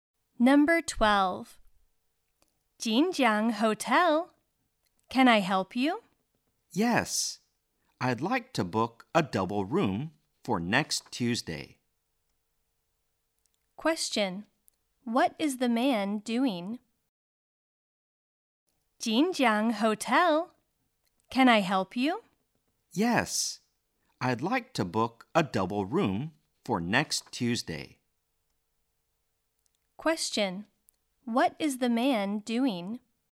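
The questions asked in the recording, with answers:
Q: What is the man doing?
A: Booking a double room at a hotel for next Tuesday.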